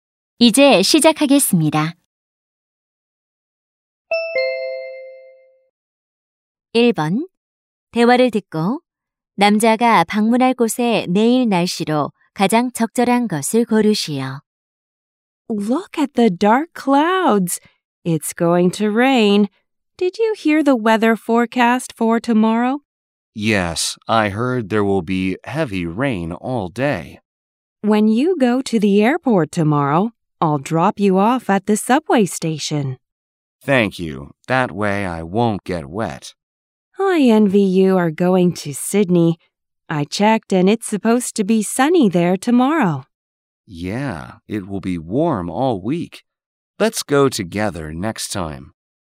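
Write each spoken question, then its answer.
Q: 대화를 듣고 남자가 방문할 곳의 내일 날씨로 가장 적절한 것을 고르시오.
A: 맑음 (시드니, 화창하고 따뜻함)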